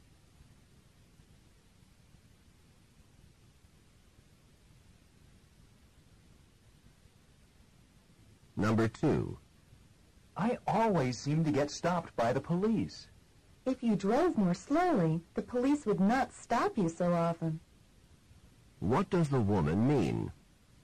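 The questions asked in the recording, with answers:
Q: What does the woman mean?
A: The man drives too fast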